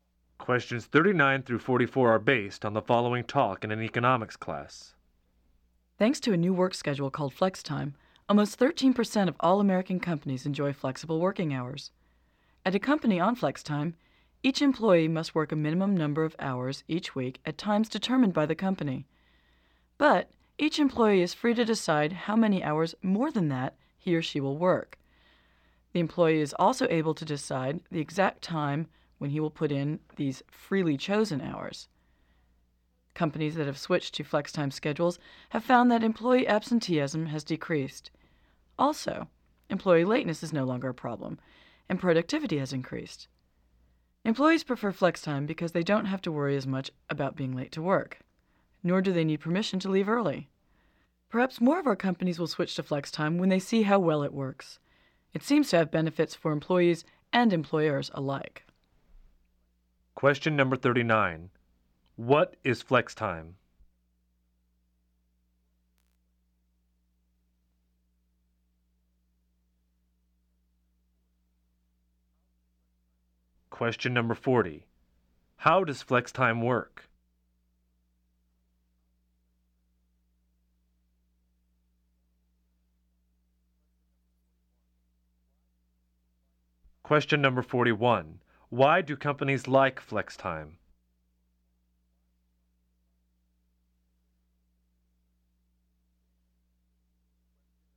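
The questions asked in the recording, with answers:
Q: What is flex time?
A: A work schedule with flexible working hours

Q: How does flex time work?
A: Employees work a required minimum of hours at set times and choose how many extra hours to work and when

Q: Why do companies like flex time?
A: Absenteeism and lateness decrease and productivity increases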